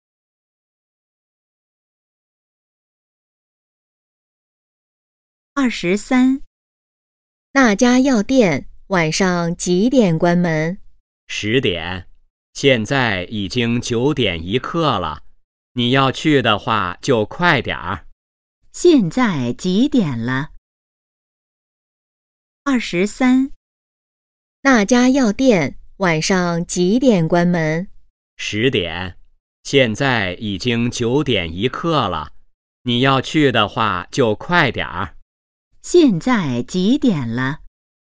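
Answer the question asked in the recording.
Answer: 九点一刻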